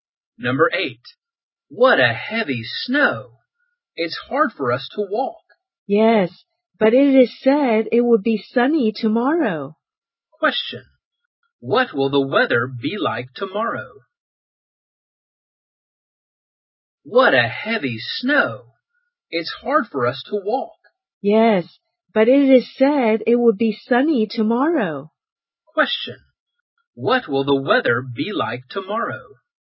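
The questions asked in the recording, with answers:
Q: what will the weather be like tomorrow?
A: Sunny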